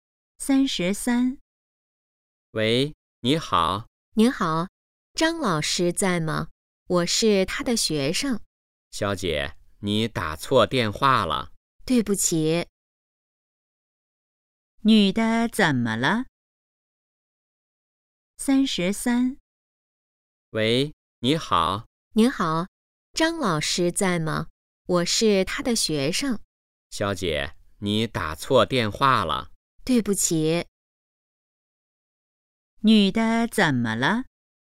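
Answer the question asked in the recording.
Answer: 打错电话了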